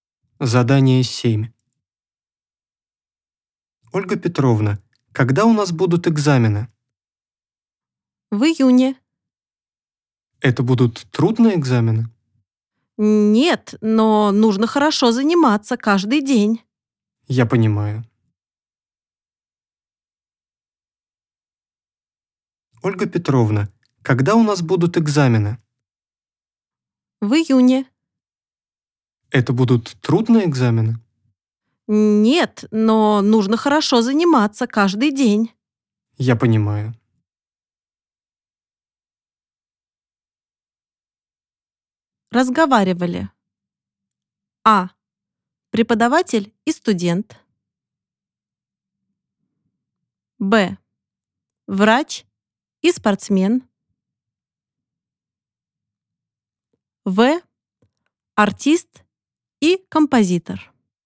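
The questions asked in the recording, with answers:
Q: Разговаривали.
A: А: Преподаватель и студент.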